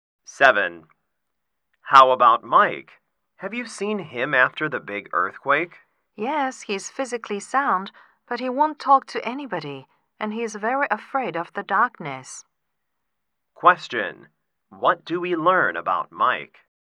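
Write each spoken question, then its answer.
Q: What do we learn about Mike?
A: He is physically fine but emotionally hurt and frightened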